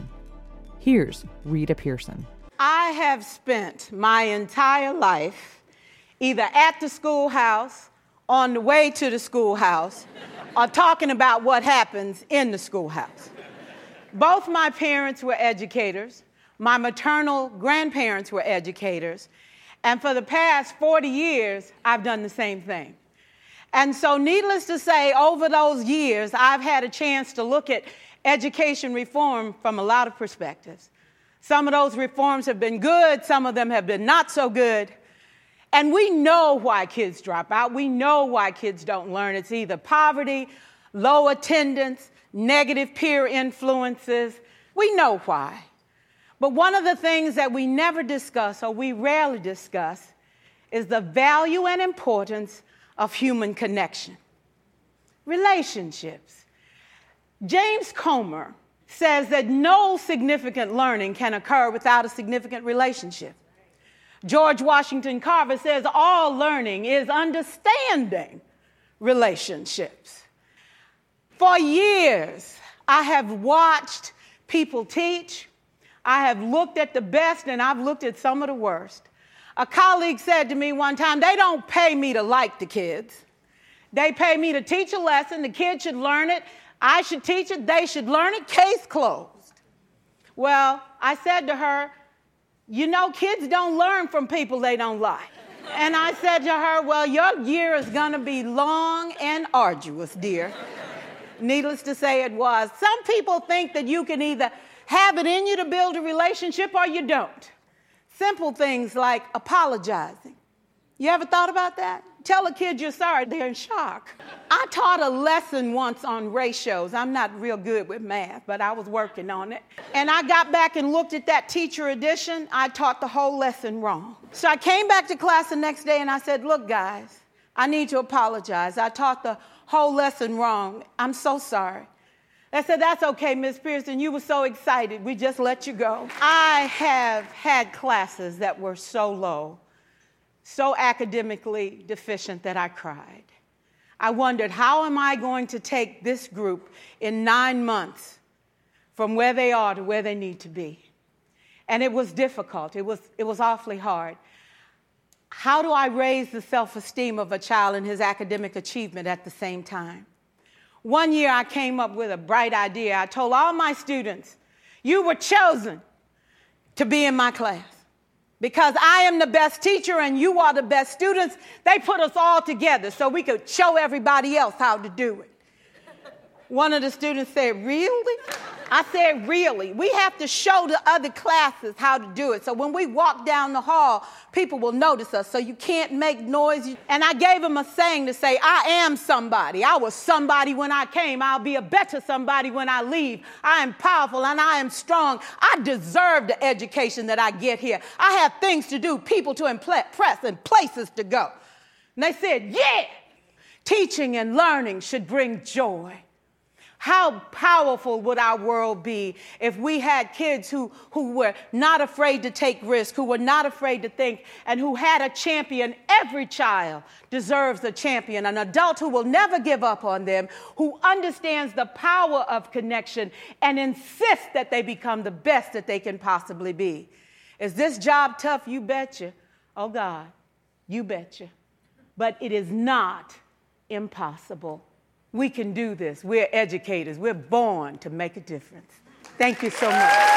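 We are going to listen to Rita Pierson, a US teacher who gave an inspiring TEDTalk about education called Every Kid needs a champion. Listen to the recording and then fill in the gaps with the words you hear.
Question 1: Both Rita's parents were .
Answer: educators

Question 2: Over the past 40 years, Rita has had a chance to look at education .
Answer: reform

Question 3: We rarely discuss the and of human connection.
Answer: value, importance

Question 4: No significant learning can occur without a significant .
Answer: relationship

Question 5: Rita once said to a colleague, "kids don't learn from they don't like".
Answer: people

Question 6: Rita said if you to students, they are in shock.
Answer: apologize

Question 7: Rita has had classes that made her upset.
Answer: academically deficient

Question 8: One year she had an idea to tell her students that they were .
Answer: the best students

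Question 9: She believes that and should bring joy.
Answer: teaching, learning

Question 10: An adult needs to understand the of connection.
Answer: power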